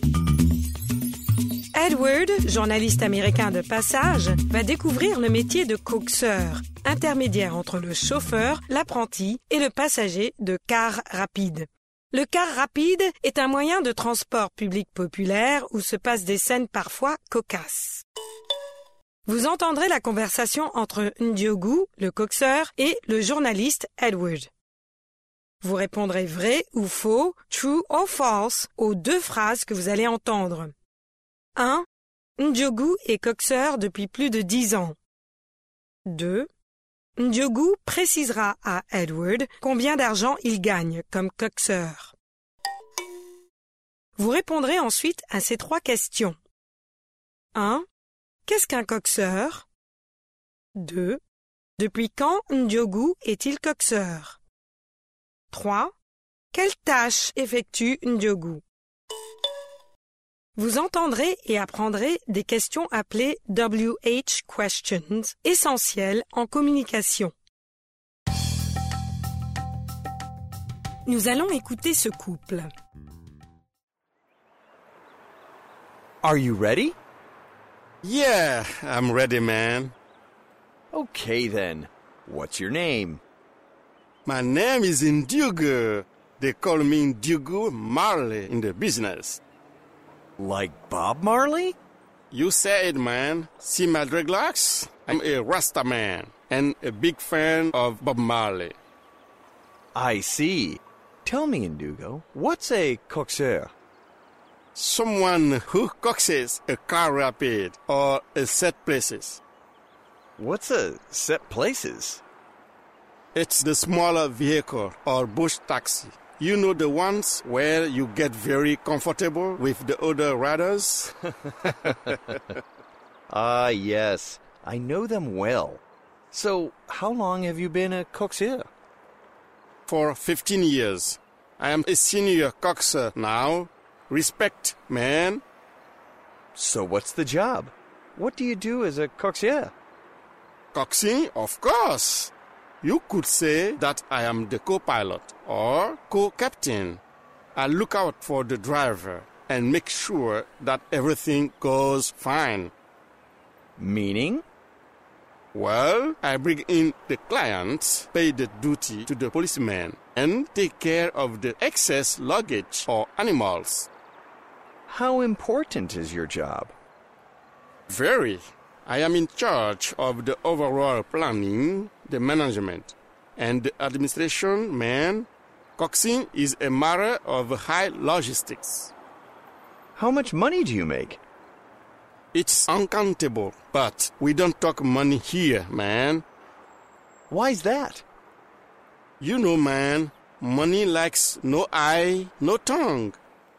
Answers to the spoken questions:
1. L'énoncé 1 est vrai.
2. L'énoncé 2 est faux.
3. Quelqu'un qui coxe un véhicule.
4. Depuis 15 ans maintenant.
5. Des tâches de planning, de gestion et d'administration.